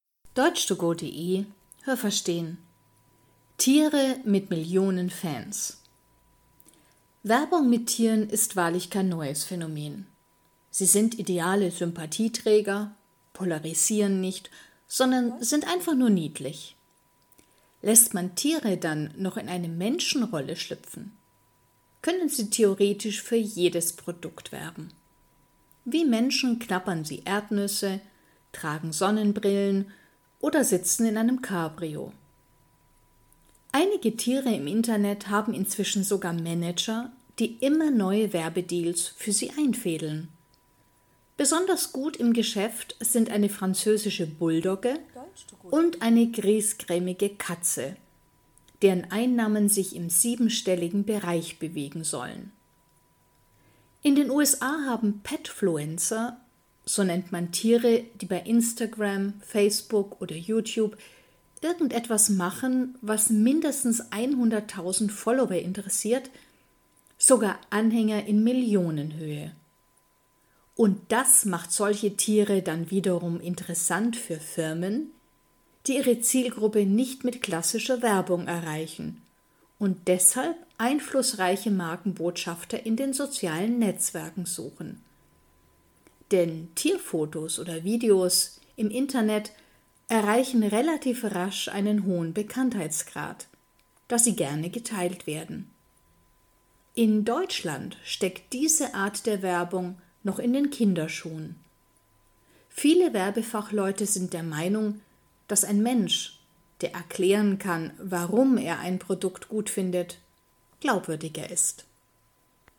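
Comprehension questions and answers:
Haben Sie das gehört? Stimmt diese Aussage?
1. Werbung mit Tieren ist ein relativ neues Phänomen.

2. Tiere können Menschen spielen und eigentlich für jedes Produkt werben.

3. Es gibt Tiere im Internet, bei denen sich Manager um Werbeaufträge kümmern.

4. Petfluencer sind Tiere, die in sozialen Netzwerken mindestens eine Million Anhänger haben.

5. Klassische Werbung funktioniert nicht bei allen Zielgruppen.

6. Tierwerbung in sozialen Medien steigert den Bekanntheitsgrad einer Marke relativ schnell.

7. In Deutschland wird Werbung mit Tieren nur bei Kindern eingesetzt.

Welches Verb passt?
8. Tiere können in eine Menschenrolle _____ .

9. Menschen _____ Erdnüsse.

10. Manager versuchen, neue Werbedeals _____ .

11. Tiervideos werden gerne _____ .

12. Diese Art der Werbung _____ noch in den Kinderschuhen.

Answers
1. falsch
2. richtig
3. richtig
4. 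falsch
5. richtig
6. richtig
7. falsch
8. schlüpfen
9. knabbern
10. einzufädeln
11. geteilt
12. steckt

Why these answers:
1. Werbung mit Tieren ist nicht neu.
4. Sie müssen mindestens 100.000 Anhänger haben.
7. Werbung mit Tieren steckt in den Kinderschuhen, das heißt, sie ist noch im Anfangsstadium.

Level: C (schwer)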